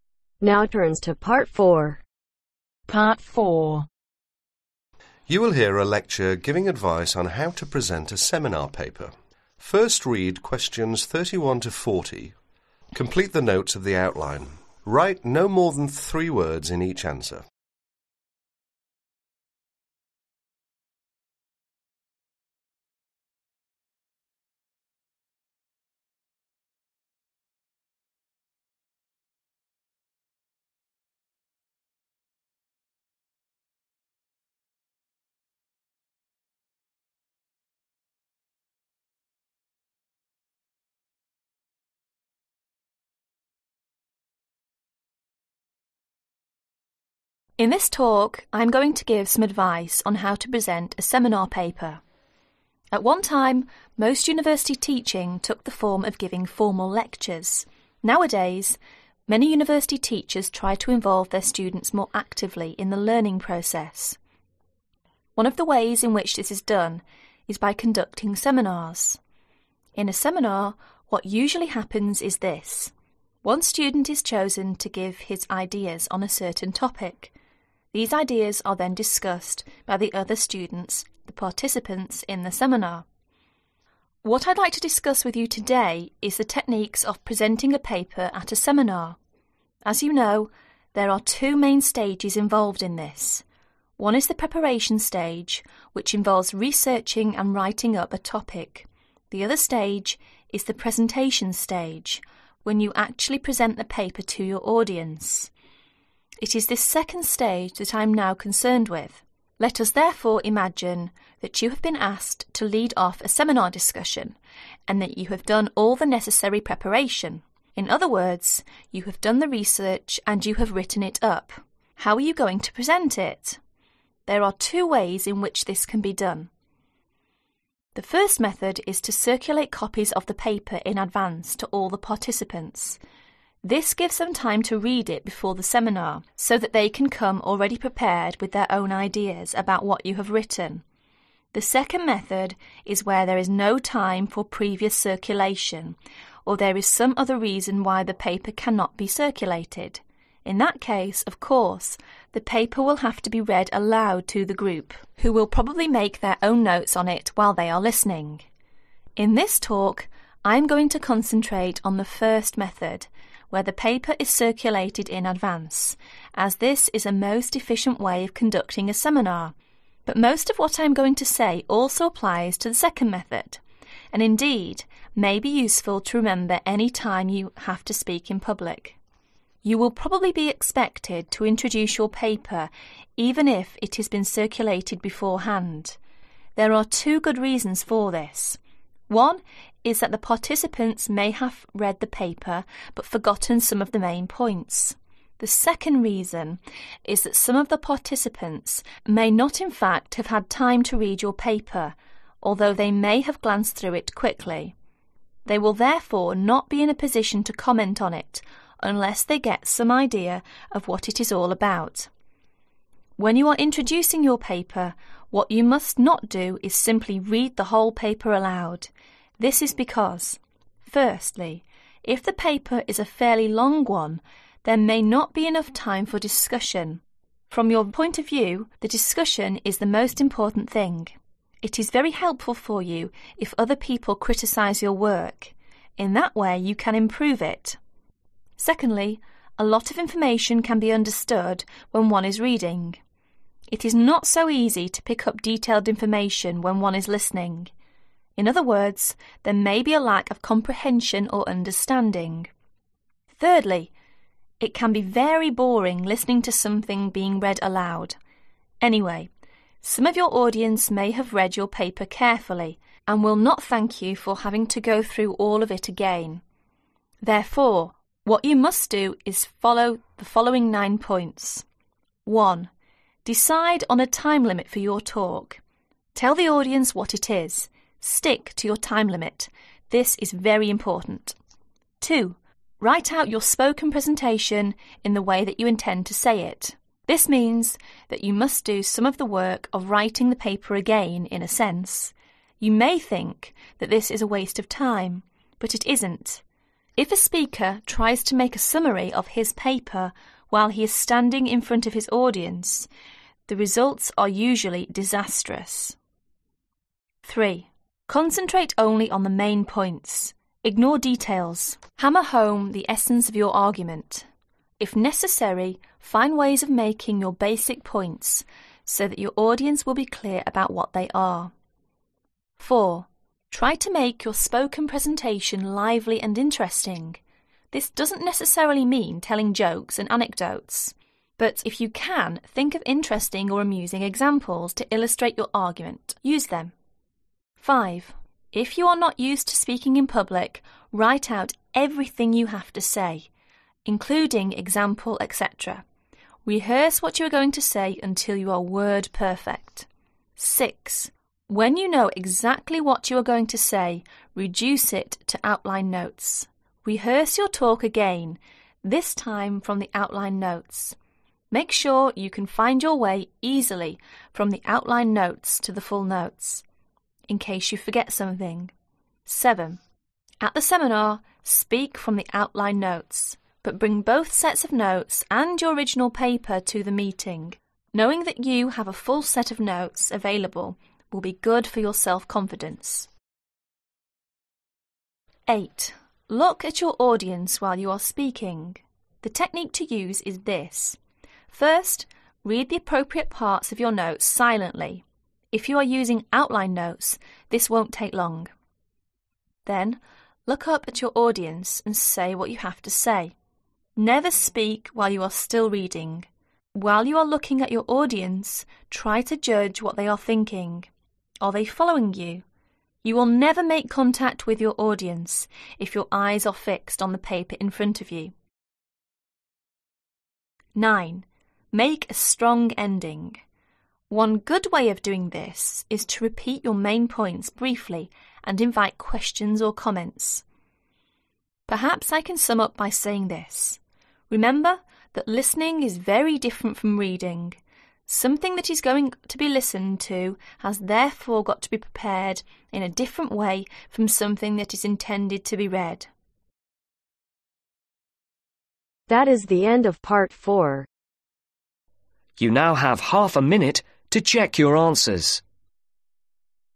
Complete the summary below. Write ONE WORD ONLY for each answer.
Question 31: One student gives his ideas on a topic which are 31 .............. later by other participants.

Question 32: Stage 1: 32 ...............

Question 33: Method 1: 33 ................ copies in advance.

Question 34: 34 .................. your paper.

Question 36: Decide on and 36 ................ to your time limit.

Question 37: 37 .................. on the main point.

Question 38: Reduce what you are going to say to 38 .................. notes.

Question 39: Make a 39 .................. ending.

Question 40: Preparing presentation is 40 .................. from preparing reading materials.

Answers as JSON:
{"31": "discussed", "32": "preparation", "33": "Circulate", "34": "Introduce", "36": "stick", "37": "Concentrate", "38": "outline", "39": "strong", "40": "different"}